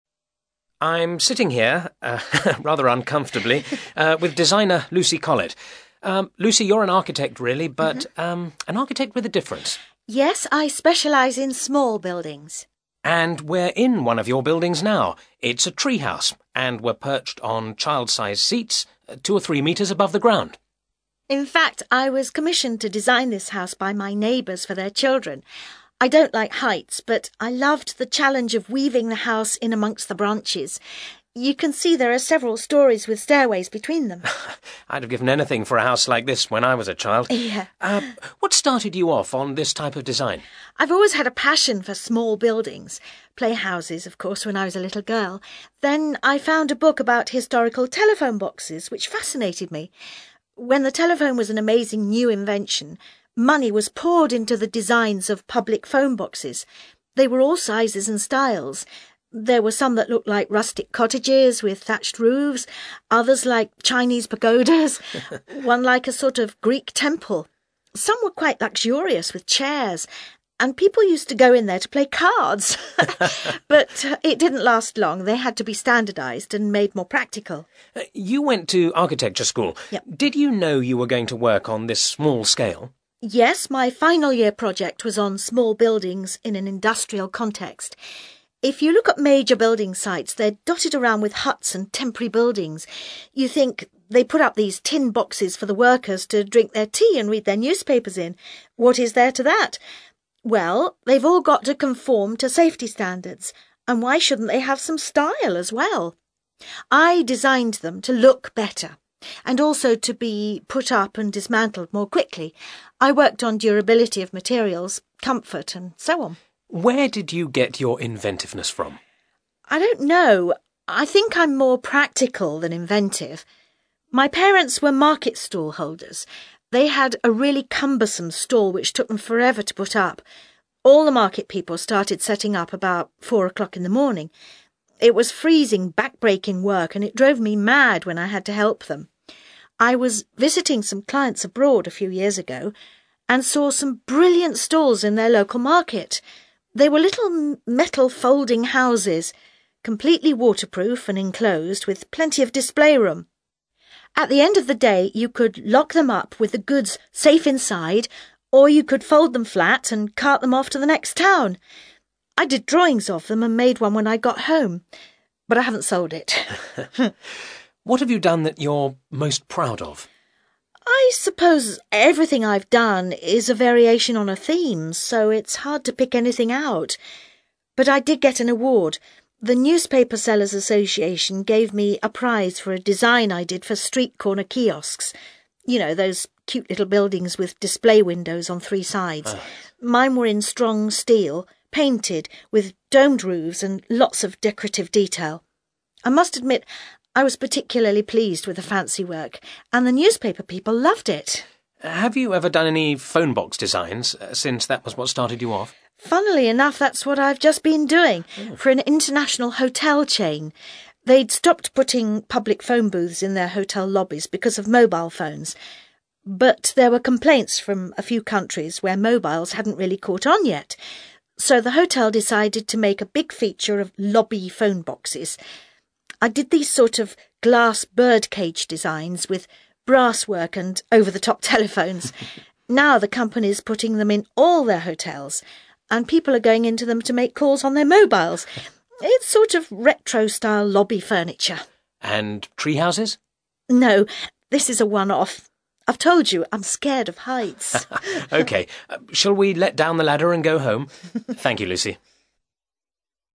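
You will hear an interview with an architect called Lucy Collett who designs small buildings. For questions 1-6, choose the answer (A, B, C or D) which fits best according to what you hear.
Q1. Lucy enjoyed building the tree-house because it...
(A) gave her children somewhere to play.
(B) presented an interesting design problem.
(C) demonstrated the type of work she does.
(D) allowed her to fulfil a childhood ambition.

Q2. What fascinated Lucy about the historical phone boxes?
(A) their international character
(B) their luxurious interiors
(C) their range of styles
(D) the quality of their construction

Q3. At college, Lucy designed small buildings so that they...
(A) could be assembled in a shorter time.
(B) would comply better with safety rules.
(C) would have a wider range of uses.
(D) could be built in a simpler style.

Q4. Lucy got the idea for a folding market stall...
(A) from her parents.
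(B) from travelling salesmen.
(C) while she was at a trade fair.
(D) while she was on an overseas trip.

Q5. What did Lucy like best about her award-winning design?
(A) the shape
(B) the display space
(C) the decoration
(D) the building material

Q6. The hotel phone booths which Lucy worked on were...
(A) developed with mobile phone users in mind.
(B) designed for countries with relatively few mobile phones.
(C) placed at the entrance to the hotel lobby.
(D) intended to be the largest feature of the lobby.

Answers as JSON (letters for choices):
{"1": "B", "2": "C", "3": "A", "4": "D", "5": "C", "6": "B"}

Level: CAE Certificate in Advanced English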